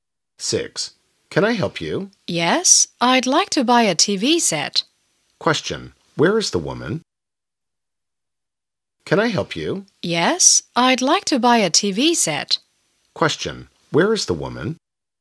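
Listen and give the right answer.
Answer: In a shop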